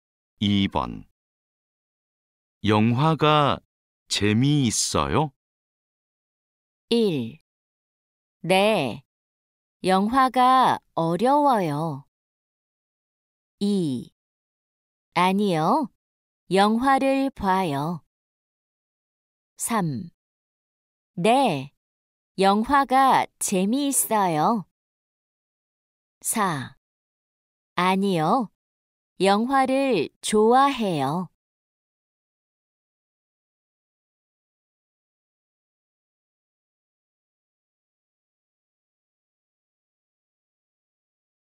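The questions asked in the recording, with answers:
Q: 영화가 재미있어요?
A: 3: 네. 영화가 재미있어요.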